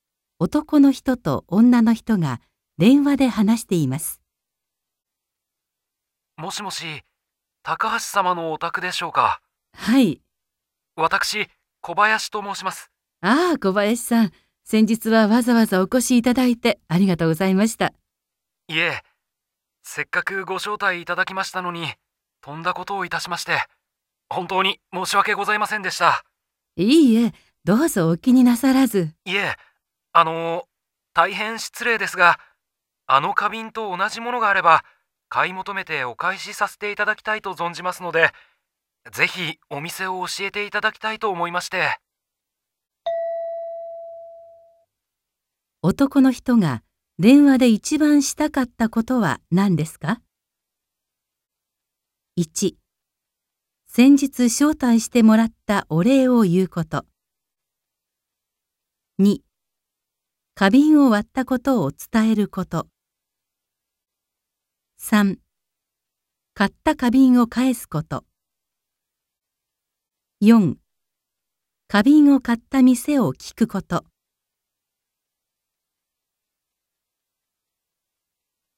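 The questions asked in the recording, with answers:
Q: 男の人が電話で一番したかったことは何ですか?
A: 4: 花瓶を買った店を聞くこと。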